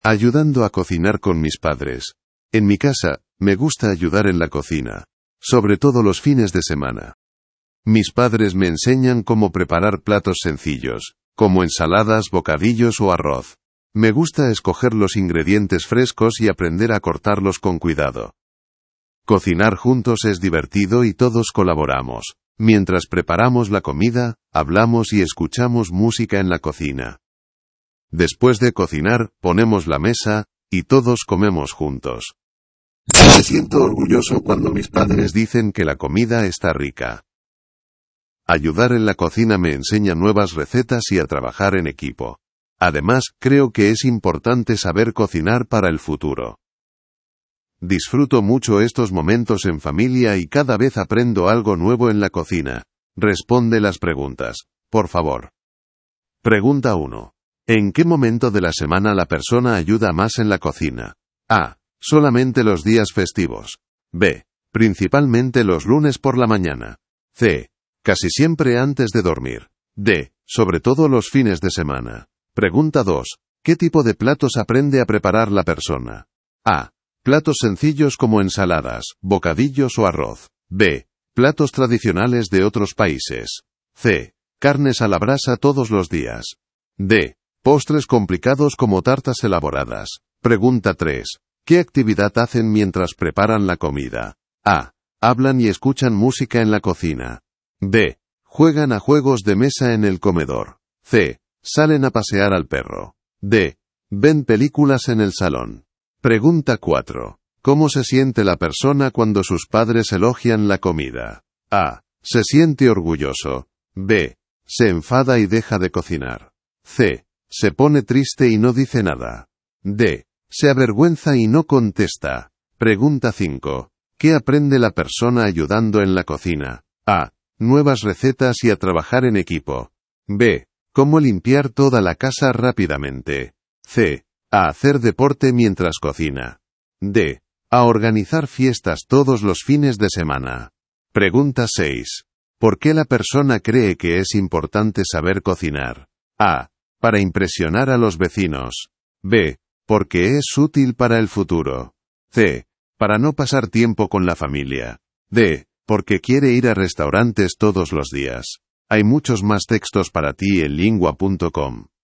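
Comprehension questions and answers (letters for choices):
Dann beantworte die folgenden Fragen zum Text:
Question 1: ¿En qué momento de la semana la persona ayuda más en la cocina?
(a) Solamente los días festivos.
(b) Principalmente los lunes por la mañana.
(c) Casi siempre antes de dormir.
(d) Sobre todo los fines de semana.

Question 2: ¿Qué tipo de platos aprende a preparar la persona?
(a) Platos sencillos como ensaladas, bocadillos o arroz.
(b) Platos tradicionales de otros países.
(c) Carnes a la brasa todos los días.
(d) Postres complicados como tartas elaboradas.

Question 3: ¿Qué actividad hacen mientras preparan la comida?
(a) Hablan y escuchan música en la cocina.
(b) Juegan a juegos de mesa en el comedor.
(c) Salen a pasear al perro.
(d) Ven películas en el salón.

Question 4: ¿Cómo se siente la persona cuando sus padres elogian la comida?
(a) Se siente orgulloso.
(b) Se enfada y deja de cocinar.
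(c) Se pone triste y no dice nada.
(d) Se avergüenza y no contesta.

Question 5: ¿Qué aprende la persona ayudando en la cocina?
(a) Nuevas recetas y a trabajar en equipo.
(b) Cómo limpiar toda la casa rápidamente.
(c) A hacer deporte mientras cocina.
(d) A organizar fiestas todos los fines de semana.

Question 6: ¿Por qué la persona cree que es importante saber cocinar?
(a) Para impresionar a los vecinos.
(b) Porque es útil para el futuro.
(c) Para no pasar tiempo con la familia.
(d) Porque quiere ir a restaurantes todos los días.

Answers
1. d
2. a
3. a
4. a
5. a
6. b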